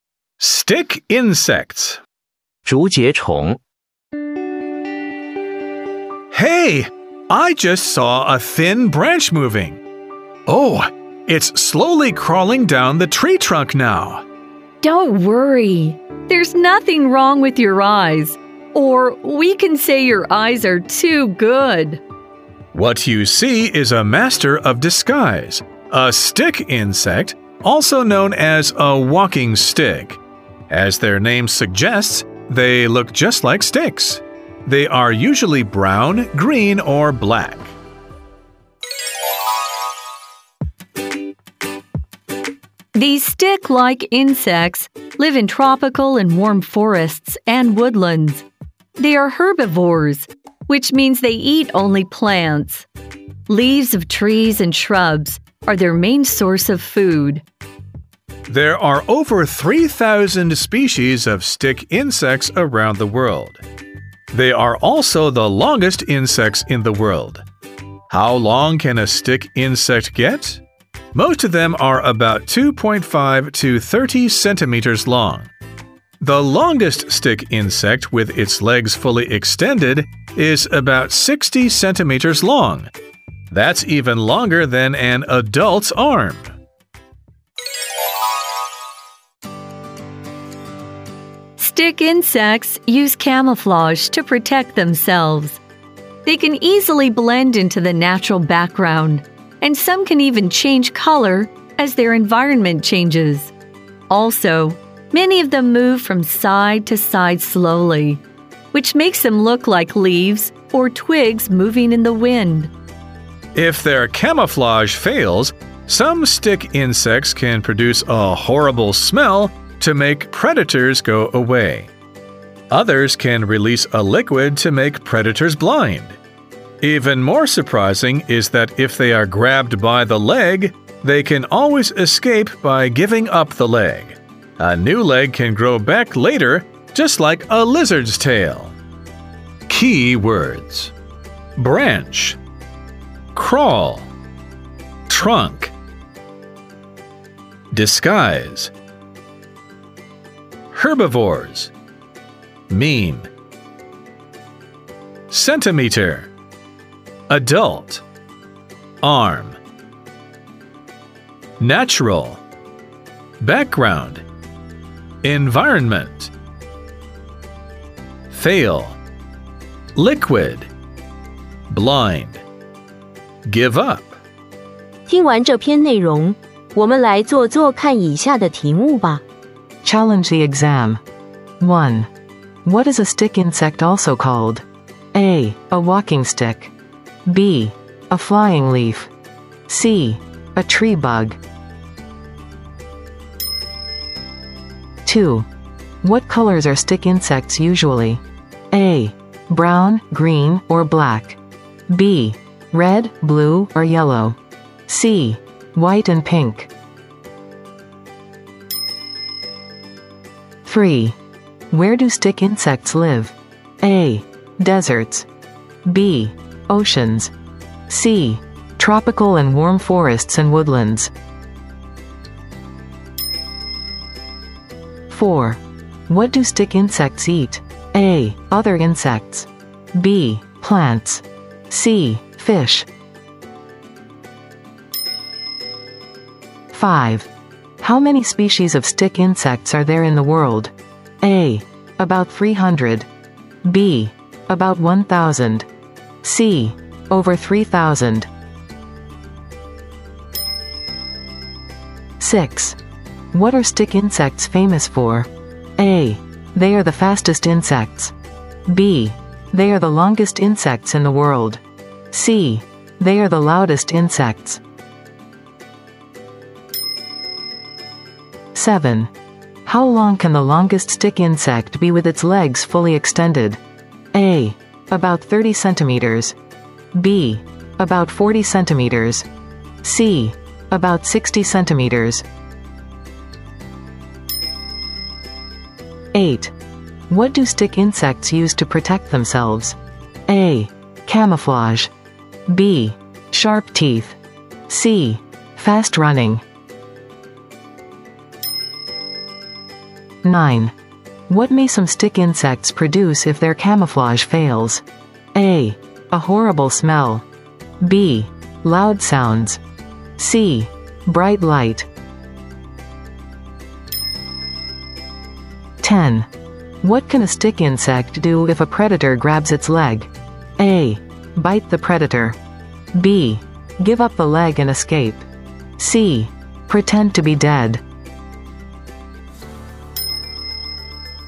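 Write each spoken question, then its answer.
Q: What is a stick insect also called?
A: A: A walking stick.

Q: What colors are stick insects usually?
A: A: Brown, green, or black.

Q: Where do stick insects live?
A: C: Tropical and warm forests and woodlands.

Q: What do stick insects eat?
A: B: Plants.

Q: How many species of stick insects are there in the world?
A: C: Over 3,000.

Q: What are stick insects famous for?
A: B: They are the longest insects in the world.

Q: How long can the longest stick insect be with its legs fully extended?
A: C: About 60 centimeters.

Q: What do stick insects use to protect themselves?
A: A: Camouflage.

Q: What may some stick insects produce if their camouflage fails?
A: A: A horrible smell.

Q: What can a stick insect do if a predator grabs its leg?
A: B: Give up the leg and escape.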